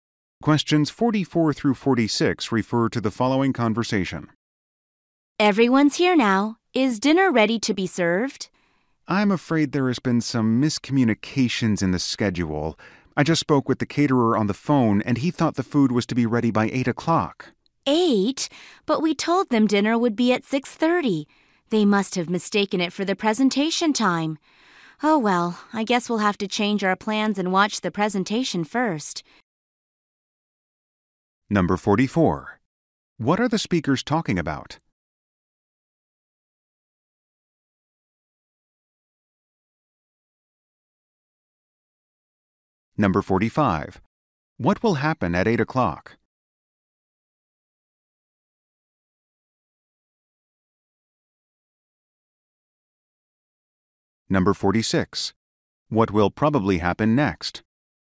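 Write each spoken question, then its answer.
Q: What are the speakers talking about?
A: A scheduling mix-up with the dinner catering

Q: What will happen at 8 o'clock?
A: Dinner will be served

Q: What will probably happen next?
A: They will watch the presentation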